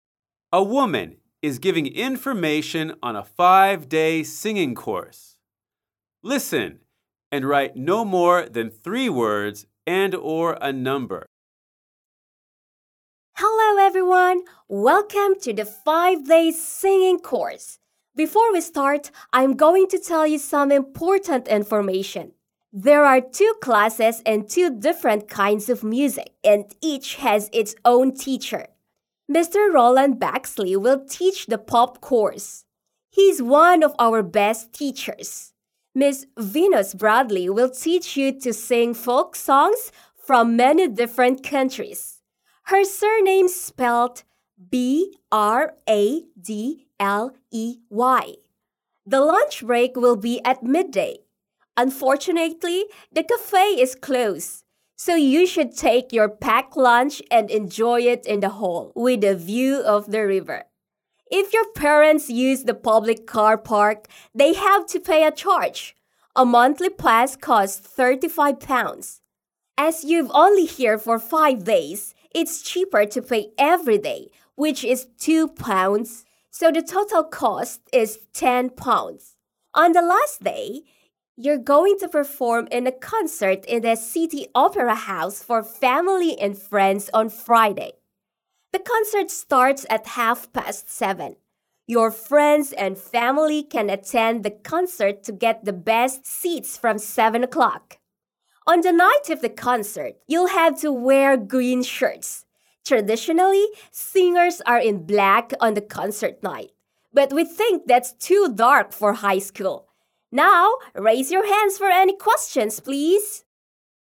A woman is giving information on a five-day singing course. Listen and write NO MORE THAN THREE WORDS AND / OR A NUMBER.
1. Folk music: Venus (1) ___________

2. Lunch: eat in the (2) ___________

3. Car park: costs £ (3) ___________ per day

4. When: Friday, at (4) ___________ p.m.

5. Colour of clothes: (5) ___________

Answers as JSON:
{"1": "Bradley", "2": "hall", "3": "2", "4": "7.30", "5": "green shirts"}

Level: lớp 10